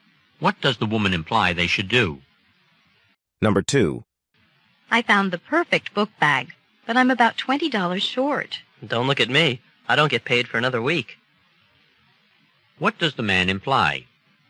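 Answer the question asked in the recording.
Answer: He can't lend her the money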